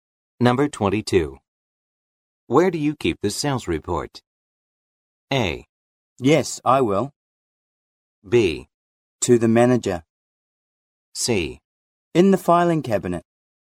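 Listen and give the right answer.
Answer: C: In the filing cabinet.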